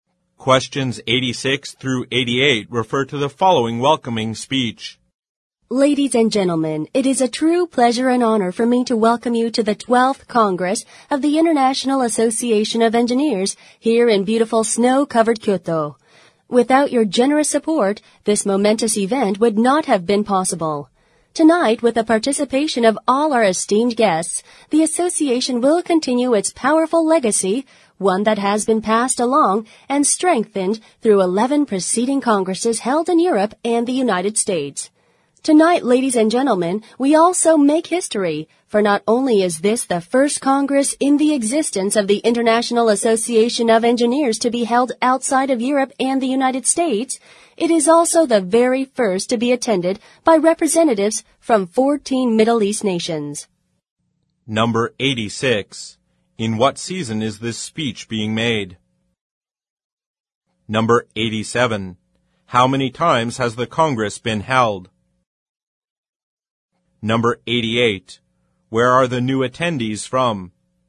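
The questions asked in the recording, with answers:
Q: In what season is this speech being made?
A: Winter

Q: How many times has the Congress been held?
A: 12 times (including this one)

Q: Where are the new attendees from?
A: 14 Middle East nations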